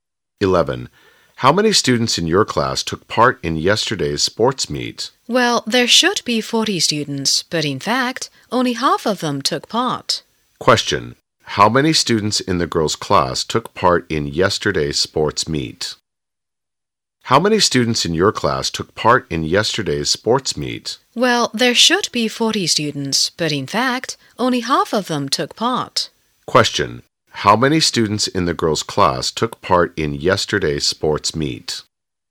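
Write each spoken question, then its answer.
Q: How many students in the girls' class took part in yesterday's sports meet?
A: 20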